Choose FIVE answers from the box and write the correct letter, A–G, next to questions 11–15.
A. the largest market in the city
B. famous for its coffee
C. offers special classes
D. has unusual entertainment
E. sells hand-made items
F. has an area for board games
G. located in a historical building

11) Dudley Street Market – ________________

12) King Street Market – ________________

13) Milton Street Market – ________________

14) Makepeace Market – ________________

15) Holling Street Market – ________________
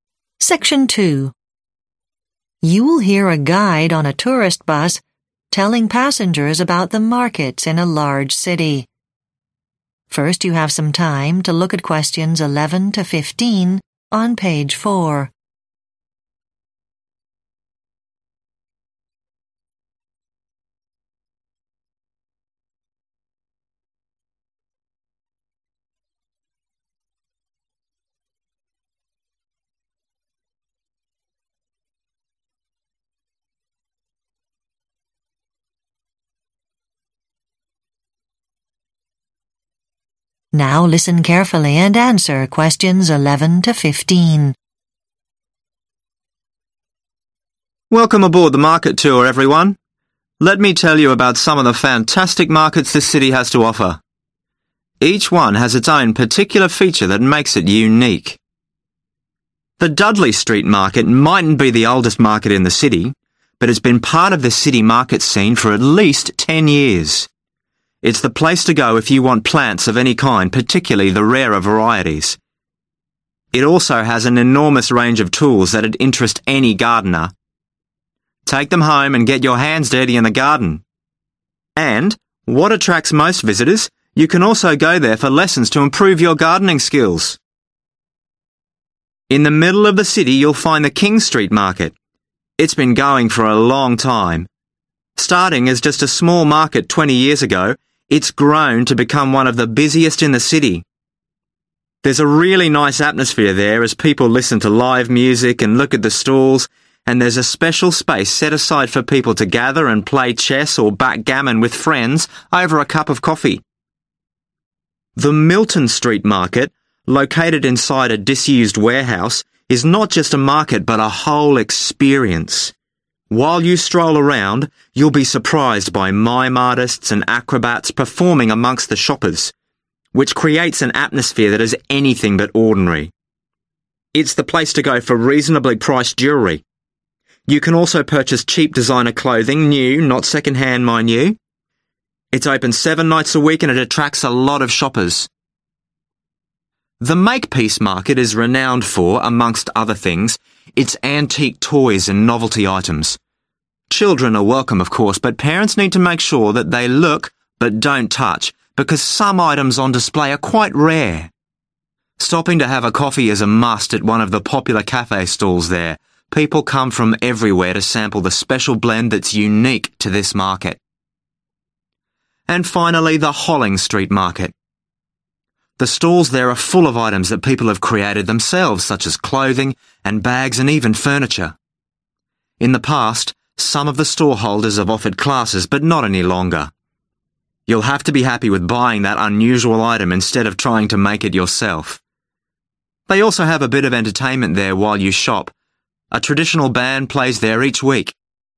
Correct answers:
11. offers special classes
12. has an area for board games
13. has unusual entertainment
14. famous for its coffee
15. sells hand-made items

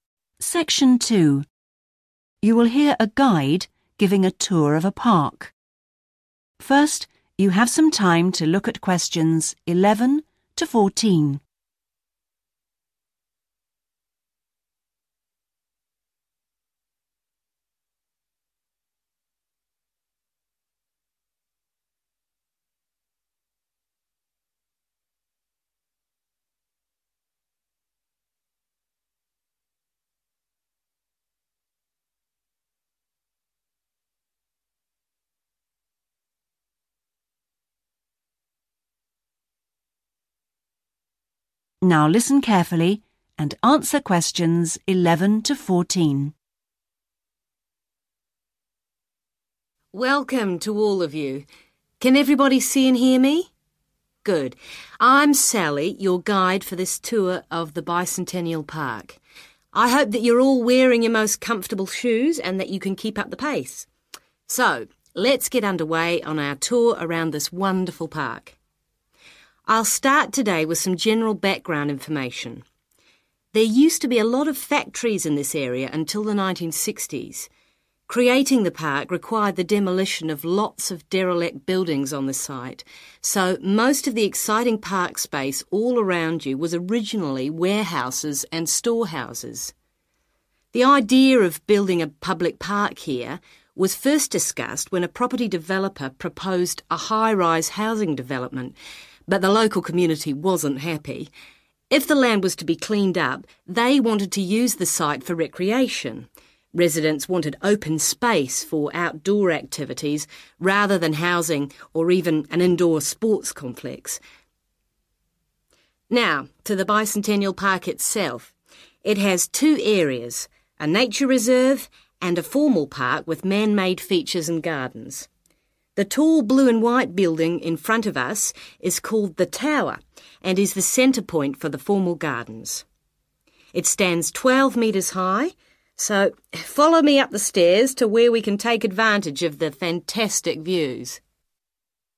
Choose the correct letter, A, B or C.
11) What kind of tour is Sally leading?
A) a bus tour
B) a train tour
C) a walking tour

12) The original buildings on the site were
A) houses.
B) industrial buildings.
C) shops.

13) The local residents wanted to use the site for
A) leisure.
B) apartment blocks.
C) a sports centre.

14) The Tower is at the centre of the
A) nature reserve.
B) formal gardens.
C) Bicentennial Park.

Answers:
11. a walking tour
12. industrial buildings.
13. leisure.
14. formal gardens.

